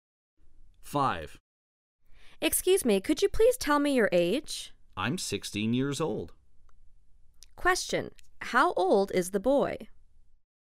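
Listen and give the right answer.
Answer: 16 years old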